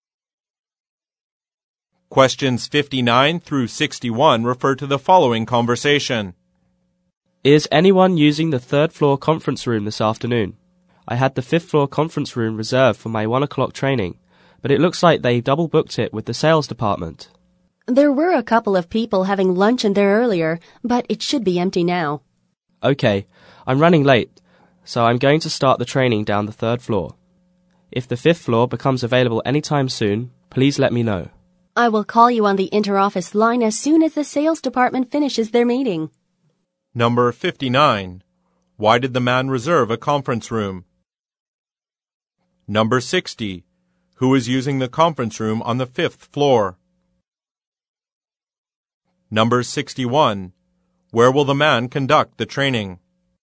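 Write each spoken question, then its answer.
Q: Why did the man reserve a conference room?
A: For his 1 o'clock training

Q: Who is using the conference room on the fifth floor?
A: The sales department

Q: Where will the man conduct the training?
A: In the third floor conference room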